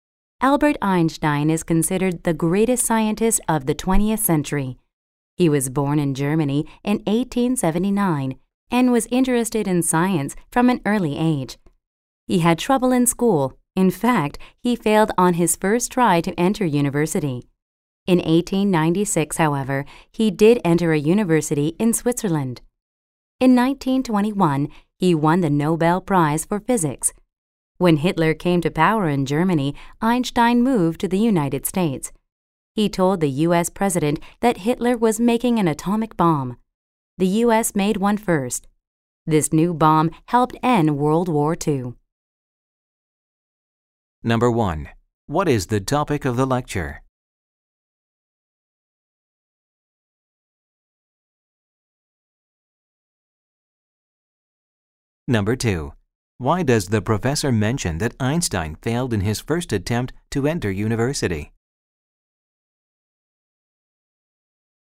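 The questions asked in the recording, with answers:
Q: What is the topic of the lecture?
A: The life of Albert Einstein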